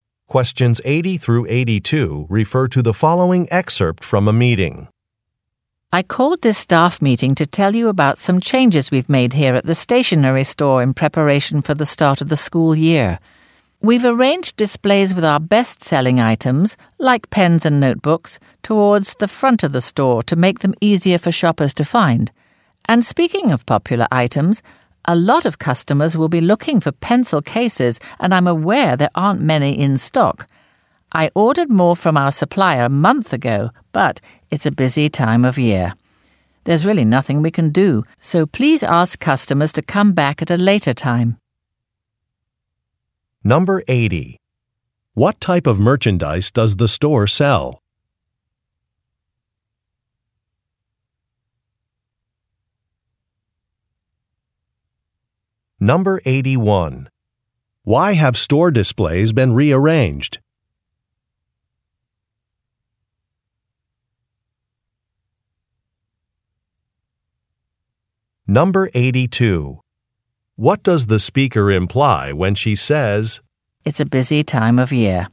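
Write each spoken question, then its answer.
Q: What type of merchandise does the store sell?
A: Stationery, such as pens and notebooks

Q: Why have store displays been rearranged?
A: To make best-selling items easier for shoppers to find

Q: What does the speaker imply when she says,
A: The pencil case order may be delayed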